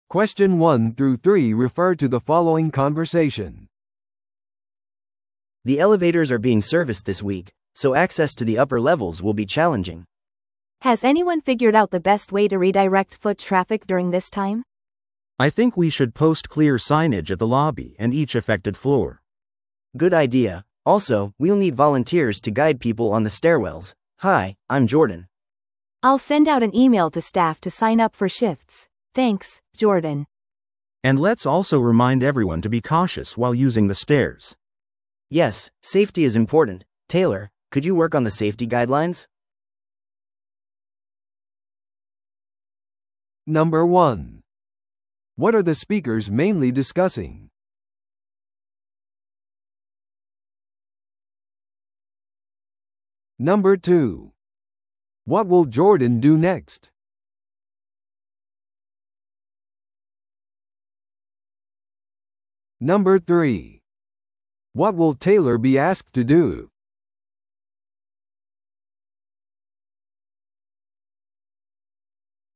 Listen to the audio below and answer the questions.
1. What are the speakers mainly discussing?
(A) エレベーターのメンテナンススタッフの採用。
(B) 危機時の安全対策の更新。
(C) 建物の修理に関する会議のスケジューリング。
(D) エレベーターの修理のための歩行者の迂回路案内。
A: エレベーターの修理のための歩行者の迂回路案内。

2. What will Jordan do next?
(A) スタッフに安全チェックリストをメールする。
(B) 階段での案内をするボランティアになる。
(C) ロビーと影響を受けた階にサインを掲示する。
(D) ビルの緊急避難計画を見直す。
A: 階段での案内をするボランティアになる。

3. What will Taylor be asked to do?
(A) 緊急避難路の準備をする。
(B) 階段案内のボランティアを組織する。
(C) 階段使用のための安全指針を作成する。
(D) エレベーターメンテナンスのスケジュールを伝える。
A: 階段使用のための安全指針を作成する。

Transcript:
A: The elevators are being serviced this week, so access to the upper levels will be challenging.
B: Has anyone figured out the best way to redirect foot traffic during this time?
C: I think we should post clear signage at the lobby and each affected floor.
A: Good idea. Also, we'll need volunteers to guide people on the stairwells. Hi, I'm Jordan.
B: I'll send out an email to staff to sign up for shifts. Thanks, Jordan.
C: And let's also remind everyone to be cautious while using the stairs.
A: Yes, safety is important. Taylor, could you work on the safety guidelines?

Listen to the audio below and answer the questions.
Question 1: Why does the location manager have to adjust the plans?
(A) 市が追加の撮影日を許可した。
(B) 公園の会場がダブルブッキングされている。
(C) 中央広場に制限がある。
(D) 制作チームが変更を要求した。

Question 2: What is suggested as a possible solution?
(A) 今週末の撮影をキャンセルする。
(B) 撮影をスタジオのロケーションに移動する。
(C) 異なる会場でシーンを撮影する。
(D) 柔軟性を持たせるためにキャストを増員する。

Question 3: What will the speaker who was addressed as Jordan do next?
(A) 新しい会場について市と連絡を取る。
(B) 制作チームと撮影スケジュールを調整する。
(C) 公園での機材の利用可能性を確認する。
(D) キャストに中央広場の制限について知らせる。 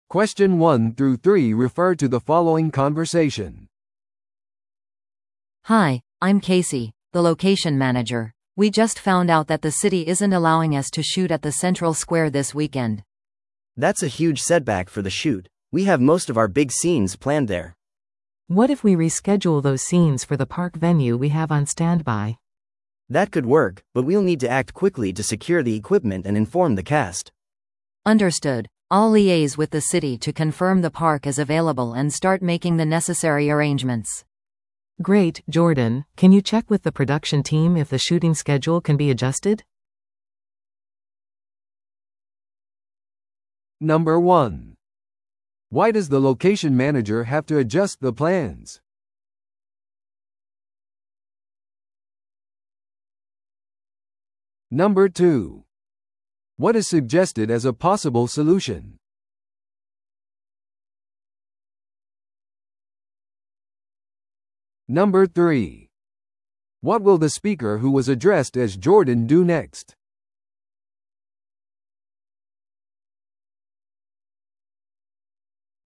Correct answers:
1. 中央広場に制限がある。
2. 異なる会場でシーンを撮影する。
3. 制作チームと撮影スケジュールを調整する。

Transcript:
A: Hi, I'm Casey, the location manager. We just found out that the city isn't allowing us to shoot at the central square this weekend.
B: That's a huge setback for the shoot. We have most of our big scenes planned there.
C: What if we reschedule those scenes for the park venue we have on standby?
B: That could work, but we'll need to act quickly to secure the equipment and inform the cast.
A: Understood. I'll liaise with the city to confirm the park is available and start making the necessary arrangements.
C: Great, Jordan, can you check with the production team if the shooting schedule can be adjusted?

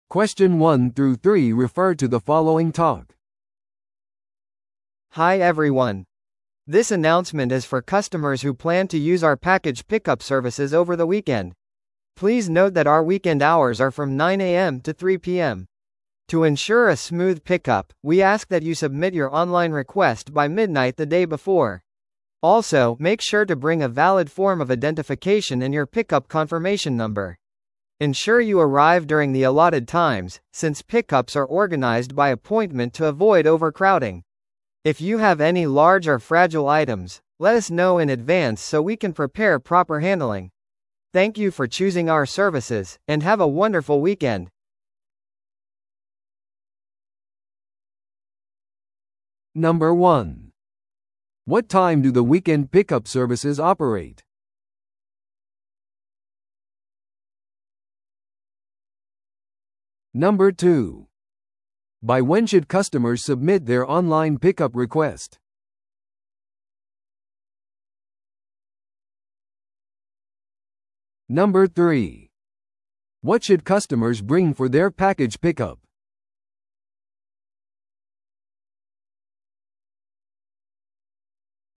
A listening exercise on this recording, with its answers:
Listen to the audio below and answer the questions.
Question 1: What time do the weekend pickup services operate?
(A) 午前9時から午後5時まで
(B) 午前9時から午後3時まで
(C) 午前8時から午後12時まで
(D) 午前10時から午後4時まで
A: 午前9時から午後3時まで

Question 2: By when should customers submit their online pickup request?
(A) ピックアップ当日の午後5時までに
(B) 前日の正午までに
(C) 前日の真夜中までに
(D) ピックアップの1時間前までに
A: 前日の真夜中までに

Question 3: What should customers bring for their package pickup?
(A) 支払い領収書と友人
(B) オンラインリクエストフォームのみ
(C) ピックアップ確認番号のみ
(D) 有効な身分証明書とピックアップ確認番号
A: 有効な身分証明書とピックアップ確認番号

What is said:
Hi everyone! This announcement is for customers who plan to use our package pickup services over the weekend. Please note that our weekend hours are from 9am to 3pm. To ensure a smooth pickup, we ask that you submit your online request by midnight the day before. Also, make sure to bring a valid form of identification and your pickup confirmation number. Ensure you arrive during the allotted times, since pickups are organized by appointment to avoid overcrowding. If you have any large or fragile items, let us know in advance so we can prepare proper handling. Thank you for choosing our services, and have a wonderful weekend!

